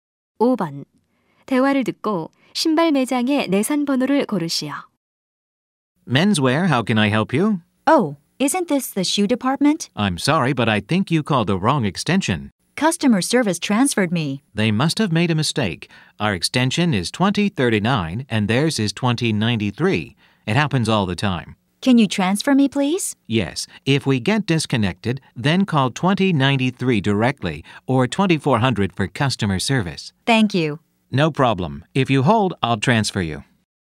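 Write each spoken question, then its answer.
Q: 대화를 듣고 신발 매장의 내선 번호를 고르시오.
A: 2093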